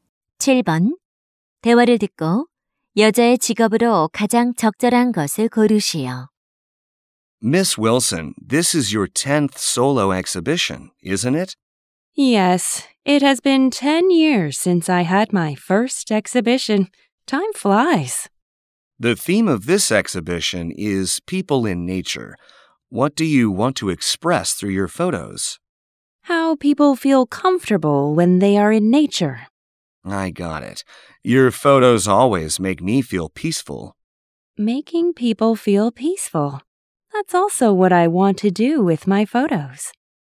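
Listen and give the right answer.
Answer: 사진작가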